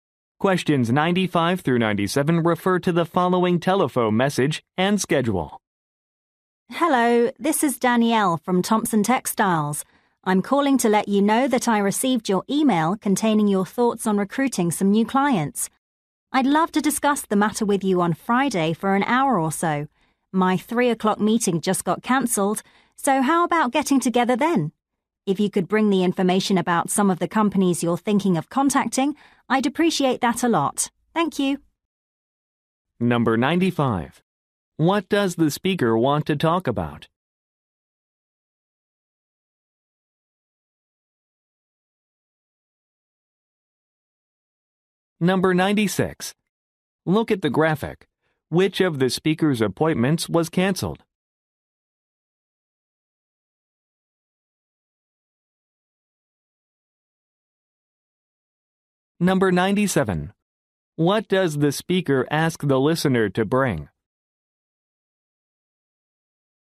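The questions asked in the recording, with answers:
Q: What does the speaker want to talk about?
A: Recruiting new clients

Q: What does the speaker ask the listener to bring?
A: Information about companies to contact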